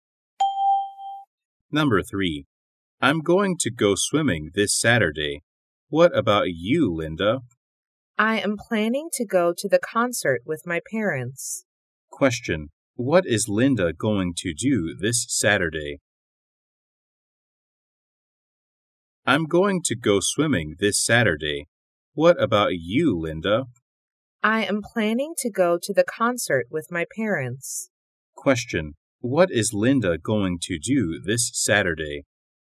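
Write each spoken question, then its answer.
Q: What is Linda going to do this Saturday?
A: Go to the concert with her parents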